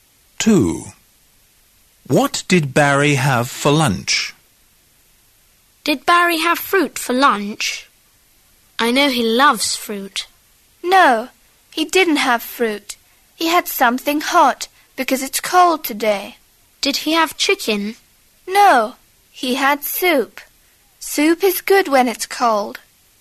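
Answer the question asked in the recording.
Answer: soup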